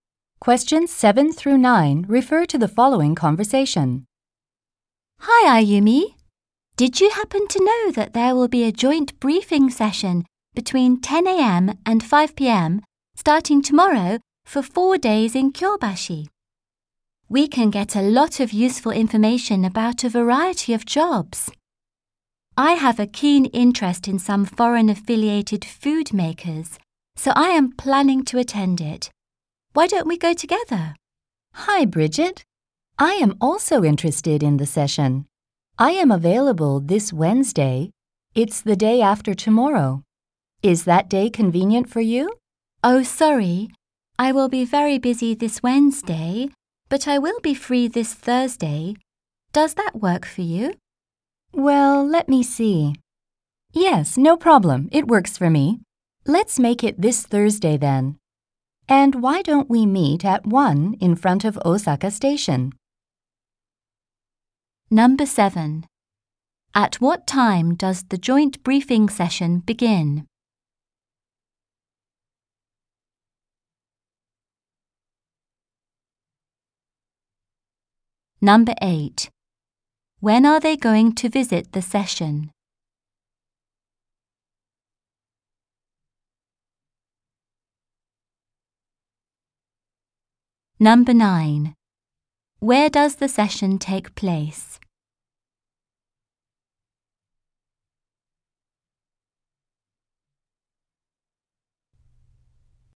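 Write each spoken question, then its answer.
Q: At what time does the joint briefing session begin?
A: At 10 a.m.

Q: When are they going to visit the session?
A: This Thursday

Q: Where does the session take place?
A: In Kyobashi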